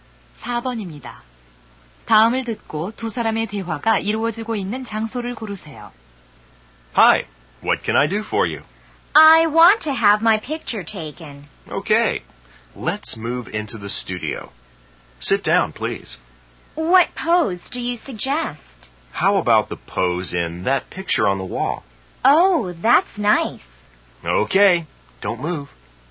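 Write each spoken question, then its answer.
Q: 다음을 듣고 두 사람의 대화가 이루어지고 있는 장소를 고르세요.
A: 사진관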